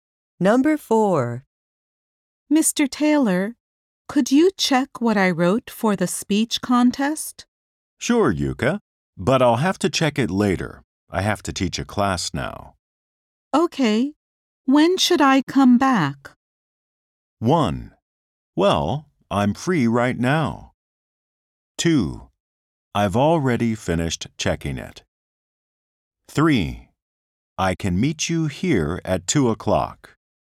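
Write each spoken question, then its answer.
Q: Okay. When should I come back?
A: 3: I can meet you here at 2 o'clock.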